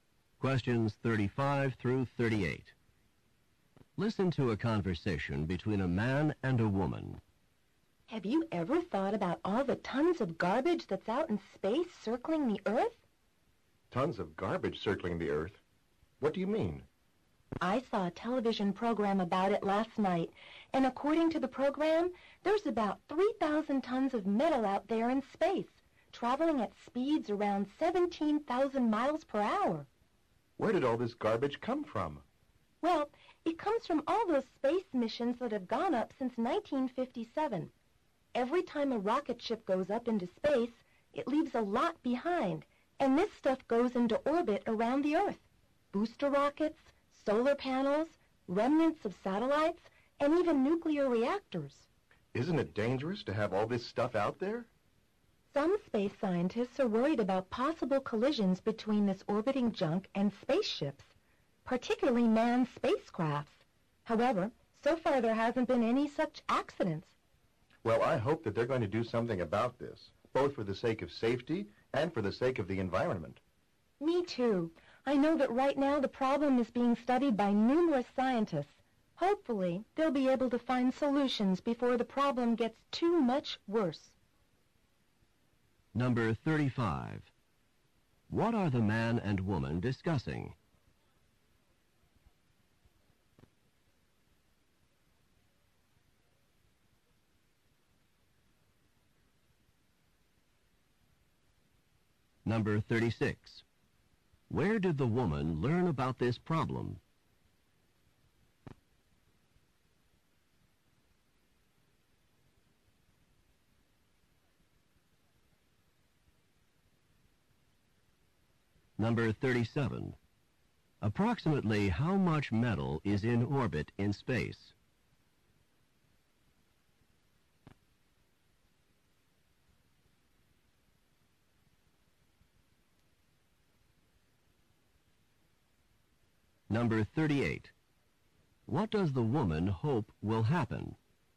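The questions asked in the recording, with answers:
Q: What are the man and woman discussing?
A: Garbage orbiting the Earth in space

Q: Where did the woman learn about this problem?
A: From a television program

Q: Approximately how much metal is in orbit in space?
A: About 3,000 tons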